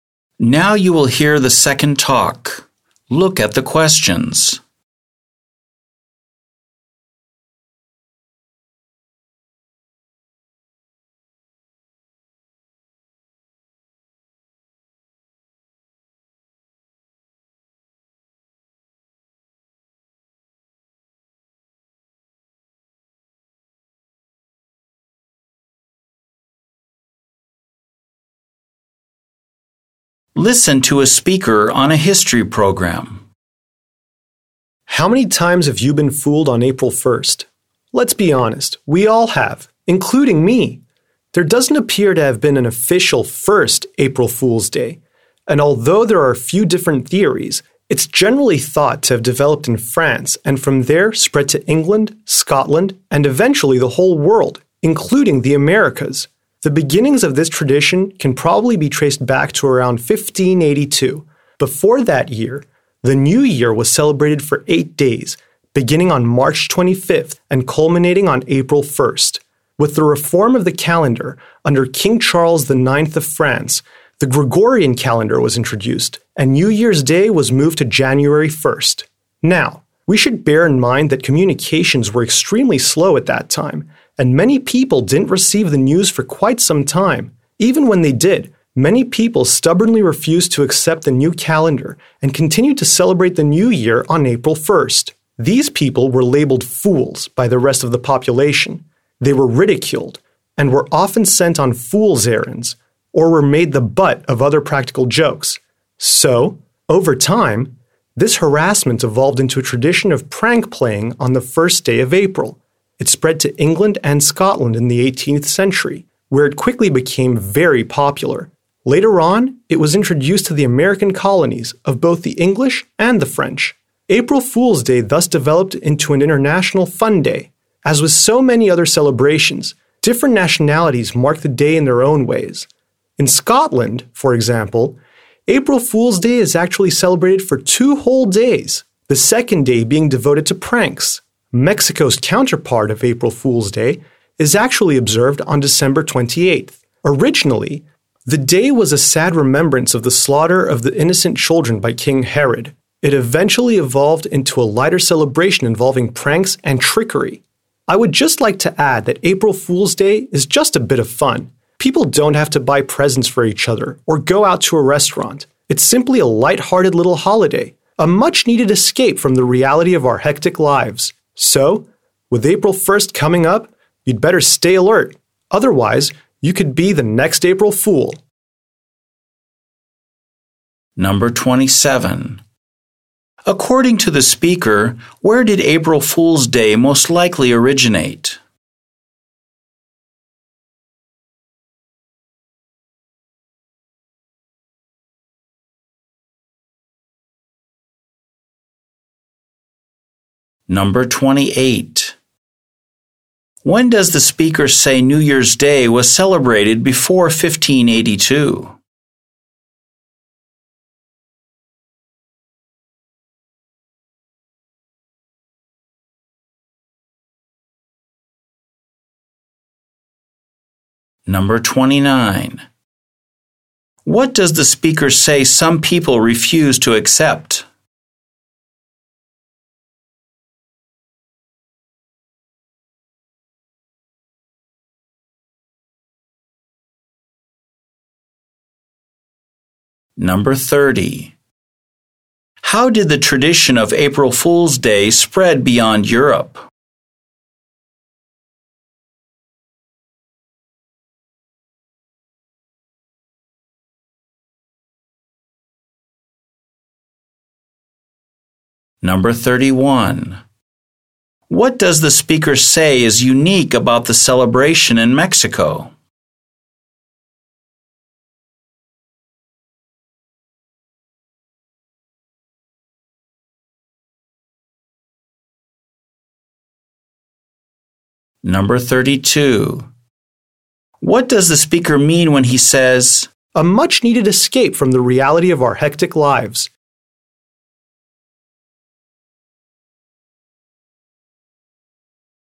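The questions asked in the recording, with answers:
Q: According to the speaker, where did April Fool's Day most likely originate?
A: France

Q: When does the speaker say New Year's Day was celebrated before 1582?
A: For 8 days, from March 25th to April 1st

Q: What does the speaker say some people refuse to accept?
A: The new (Gregorian) calendar

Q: How did the tradition of April Fool's Day spread beyond Europe?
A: It was introduced to the English and French colonies in America

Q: What does the speaker say is unique about the celebration in Mexico?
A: It is held on December 28th and began as a sad remembrance of the innocent children killed by Herod

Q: What does the speaker mean when he says,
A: It is a lighthearted break from our busy, stressful lives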